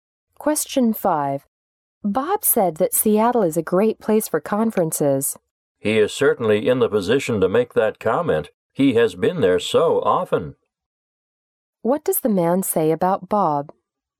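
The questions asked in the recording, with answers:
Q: What does the man say about Bob?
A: He has been to Seattle many times.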